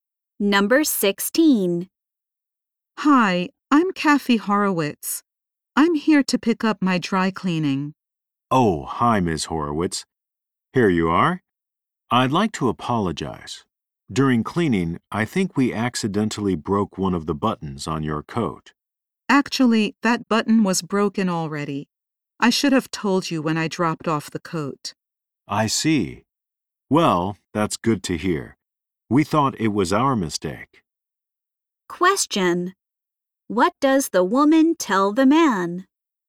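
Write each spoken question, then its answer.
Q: What does the woman tell the man?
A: The button was already broken.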